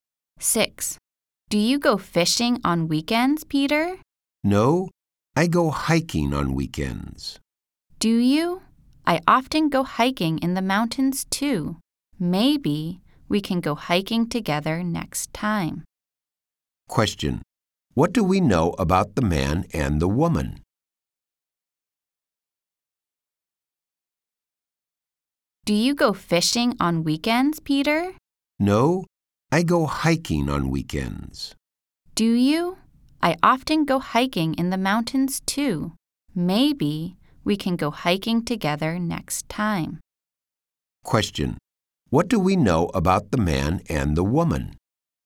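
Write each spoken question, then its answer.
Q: What do we know about the man and the woman?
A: They both like hiking.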